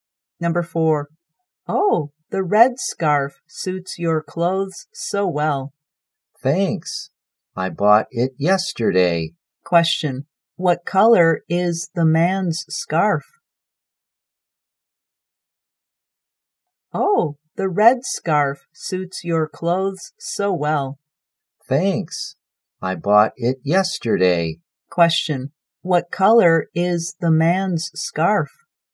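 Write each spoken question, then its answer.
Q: Question, what color is the man's scarf?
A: Red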